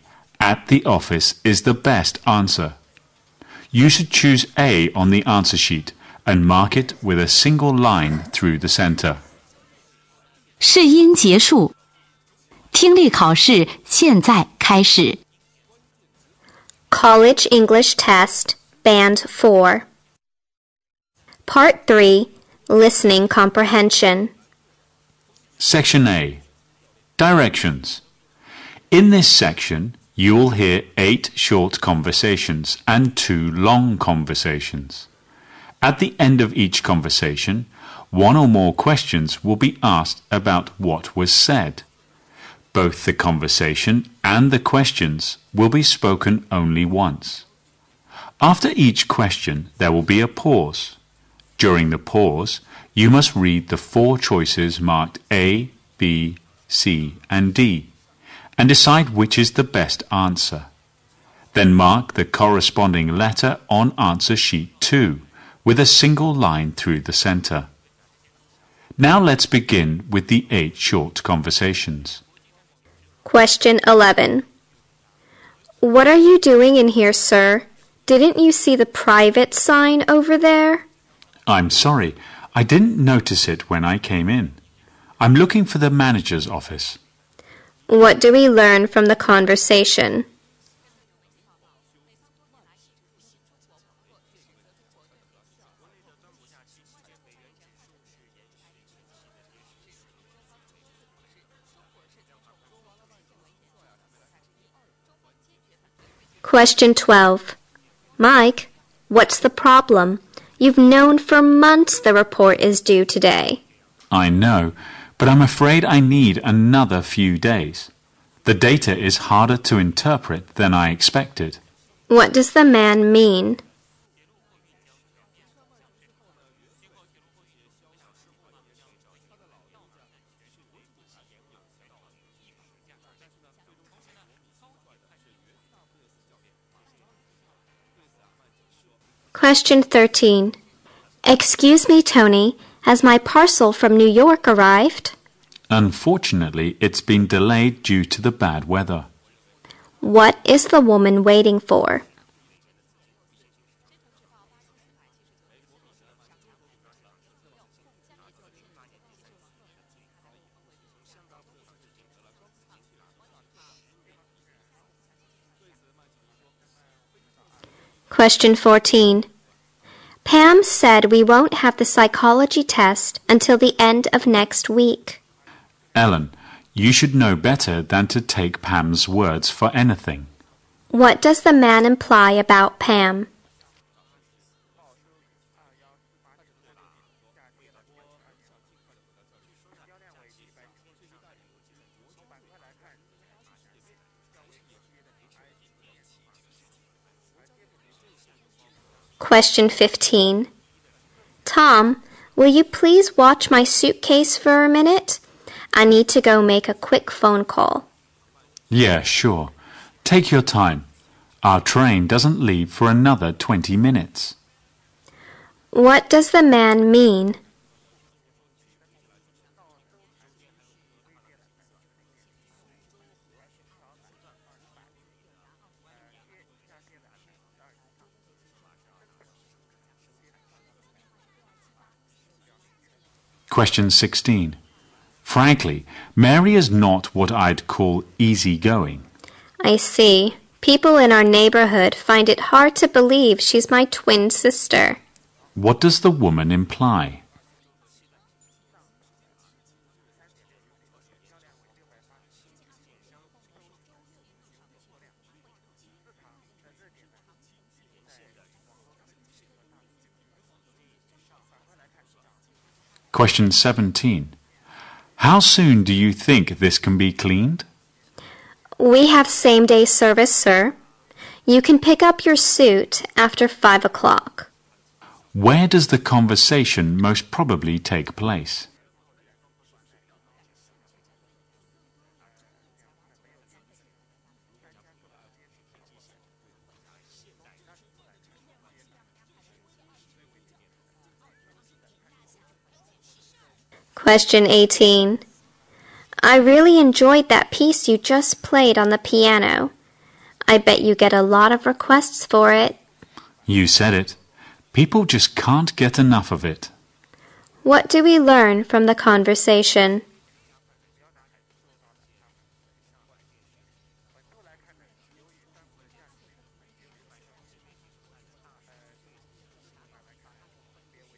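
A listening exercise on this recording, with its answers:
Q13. What is the woman waiting for?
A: A parcel from New York.

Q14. What doesthe man imply about Pam?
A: Pam is not reliable.

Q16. What does the woman imply?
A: She and her twin sister Mary are very different in personality.

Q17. Where does the conversation most probably take place?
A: At a dry cleaner's.

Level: 英语四级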